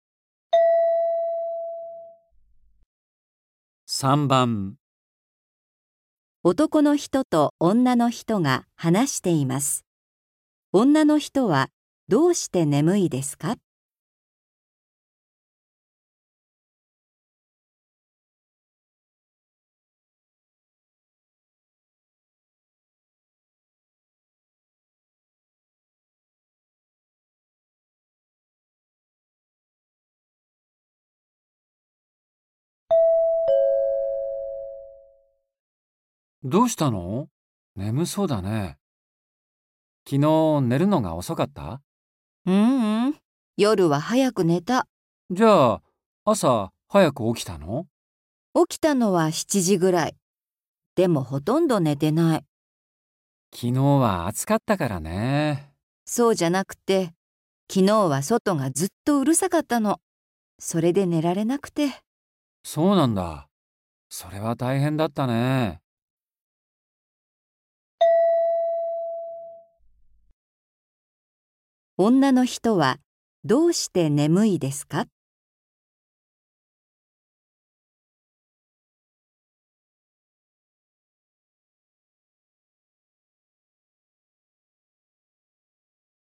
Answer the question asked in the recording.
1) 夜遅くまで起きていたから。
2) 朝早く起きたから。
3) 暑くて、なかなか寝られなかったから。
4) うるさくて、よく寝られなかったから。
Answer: 4) うるさくて、よく寝られなかったから。

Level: 初級